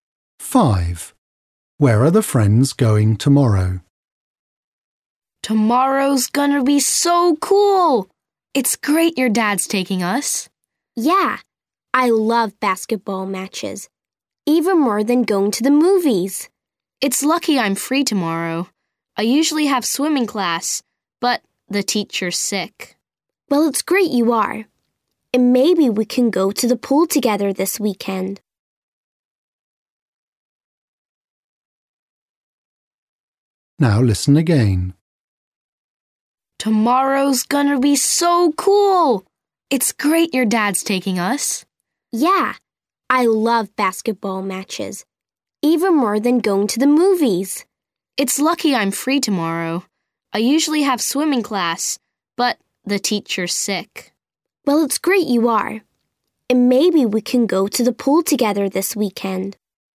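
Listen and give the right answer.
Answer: to a basketball match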